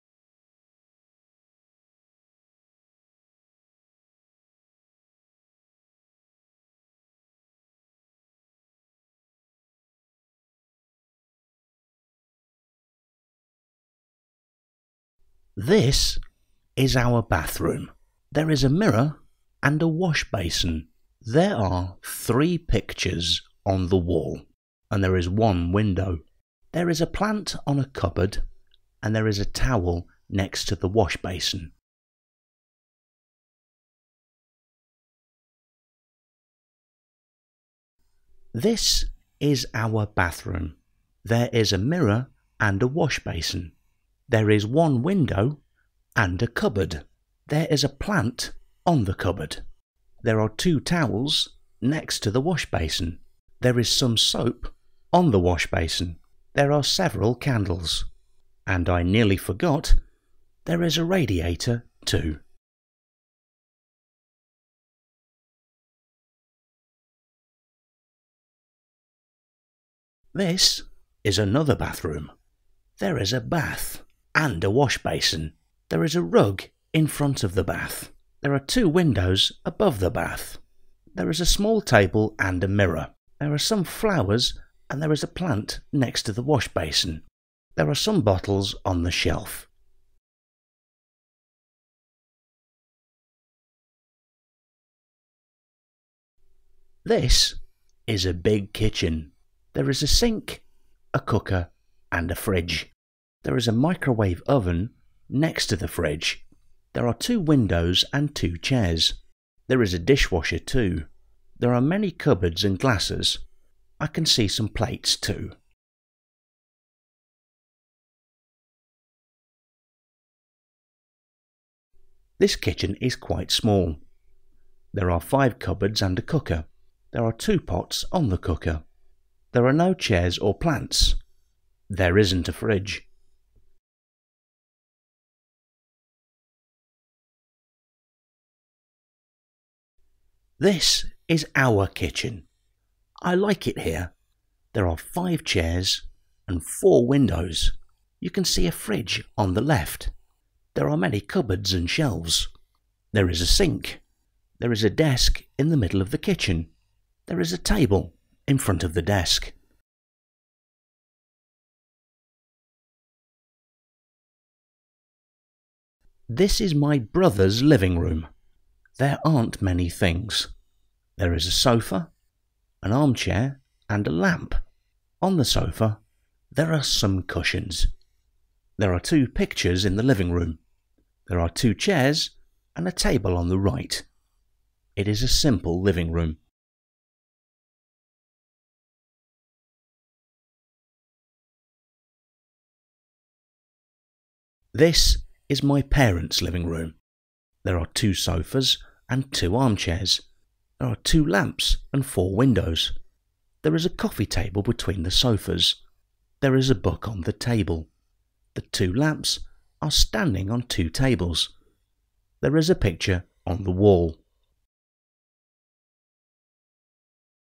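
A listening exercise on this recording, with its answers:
4- Listen and answer the questions.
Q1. What rooms are mentioned?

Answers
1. Bathroom, kitchen and living room

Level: A1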